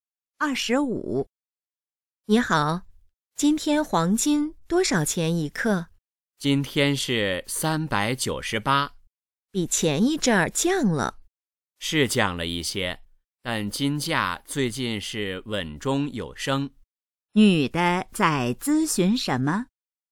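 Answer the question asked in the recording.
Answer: 黄金价格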